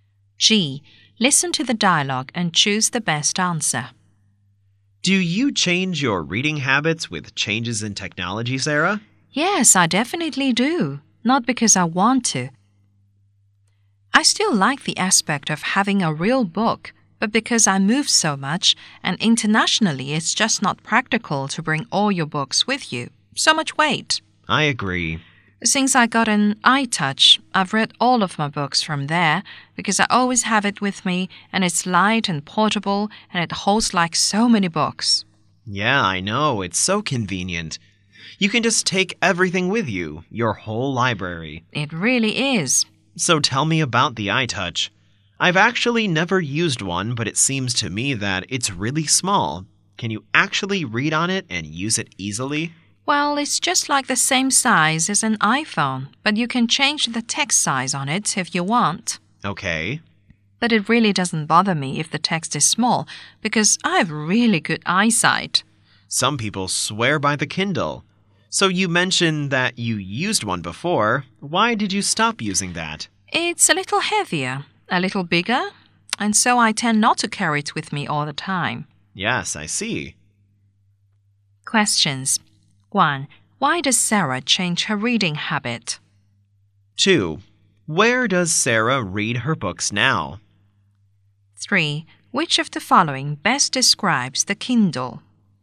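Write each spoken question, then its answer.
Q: Why does Sarah change her reading habit?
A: Because she moves a lot, including internationally, so carrying real books isn't practical

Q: Where does Sarah read her books now?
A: On her iTouch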